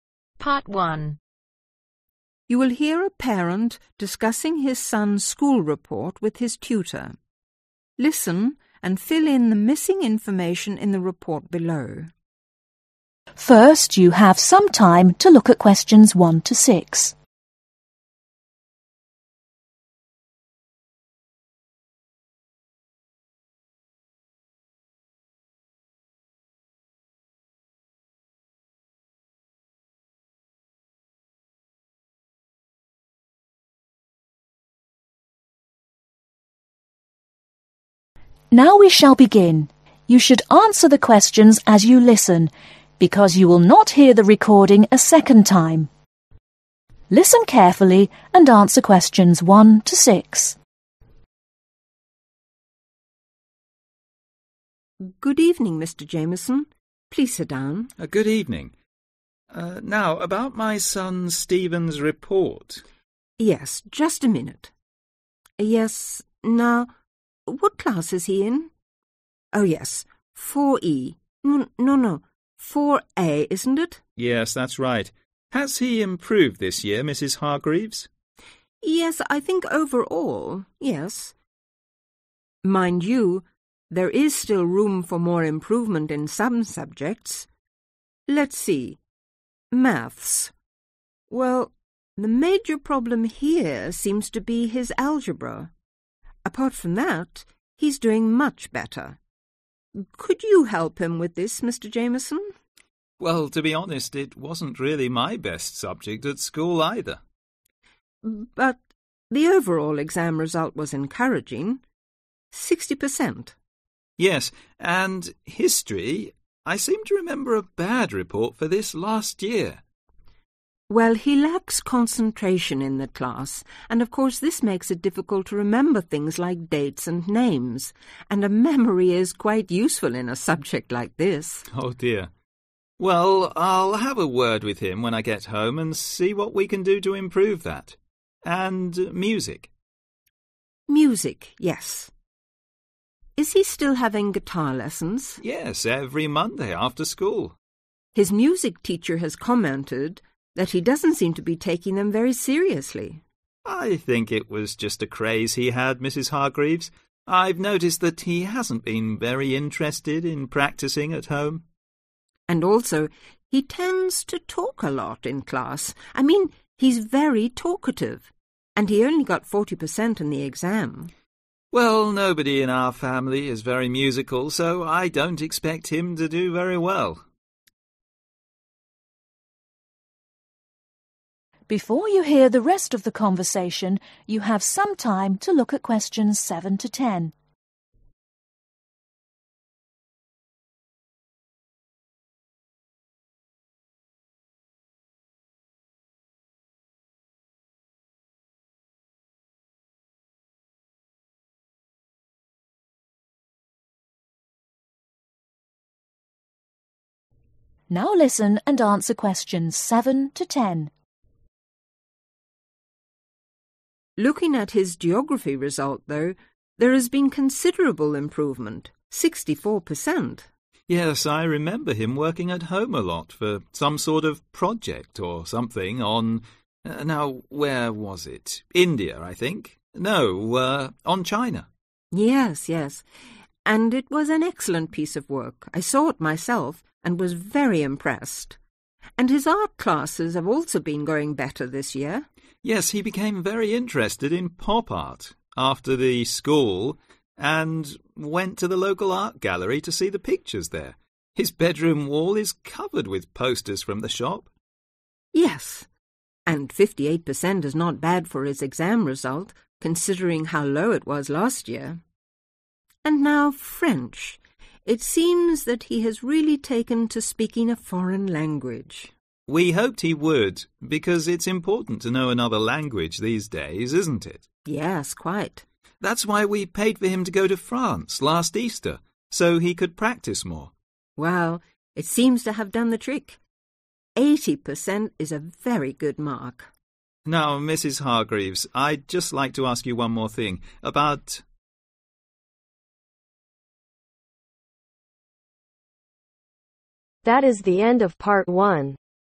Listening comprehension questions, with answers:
Complete the form below. Write ONE WORD OR A NUMBER for each answer.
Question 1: Class: (1)............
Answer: 4A

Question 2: Mathematics | (2)............ | A satisfactory year's work |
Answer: 60%

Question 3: (3)............ | 48% |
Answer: History

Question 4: Stephen needs to concentrate more in class. he seems to have a very poor (4)............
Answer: Memory

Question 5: He is not taking his (5)............ lessons seriously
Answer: Guitar

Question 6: Stephen tends to (6)............ a lot in class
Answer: Talk

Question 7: He has improved a lot this year and his project on (7)............ was excellent.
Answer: China

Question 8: (8)............ | 58% |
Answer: Art

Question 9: He seemed to become very interested after our visit to the local (9)............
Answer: Art gallery

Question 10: French | (10)........... |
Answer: 80%